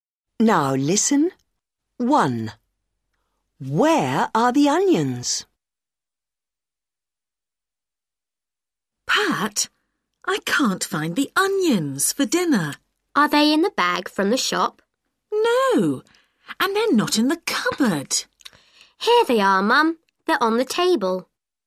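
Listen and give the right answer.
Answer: On the table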